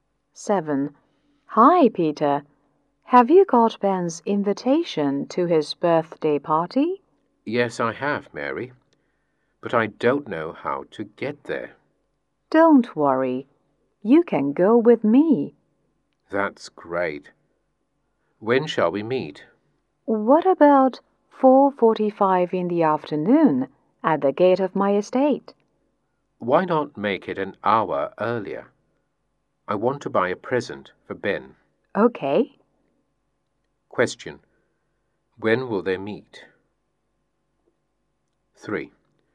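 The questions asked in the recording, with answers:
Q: When will they meet?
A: At 3:45 in the afternoon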